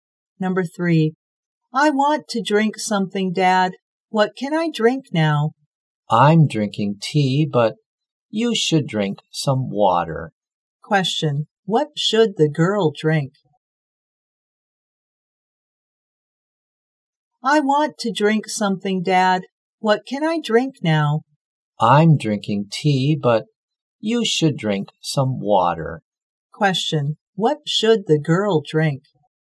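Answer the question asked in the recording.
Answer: Water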